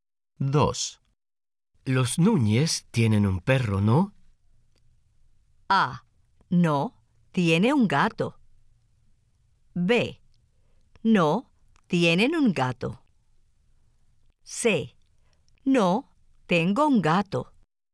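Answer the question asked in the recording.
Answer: B: No, tienen un gato.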